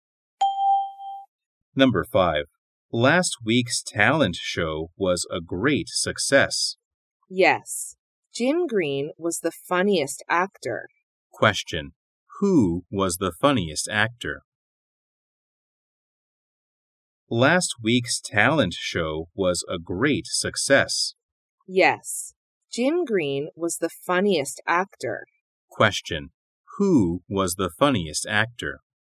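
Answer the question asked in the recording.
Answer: Jim Green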